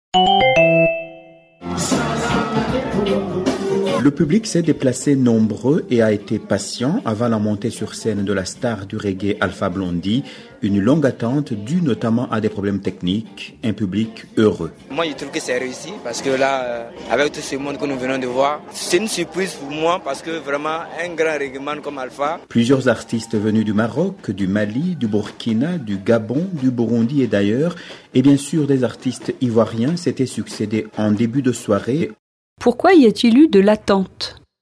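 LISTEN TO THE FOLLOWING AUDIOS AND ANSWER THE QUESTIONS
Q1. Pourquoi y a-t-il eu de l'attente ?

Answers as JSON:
{"1": "À cause de problèmes techniques."}

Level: Levels B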